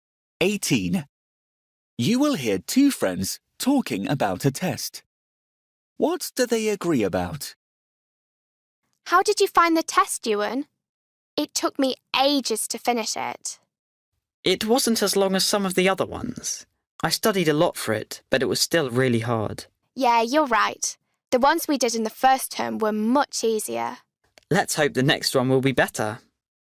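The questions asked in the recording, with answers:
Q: What do they agree about?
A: the test was very hard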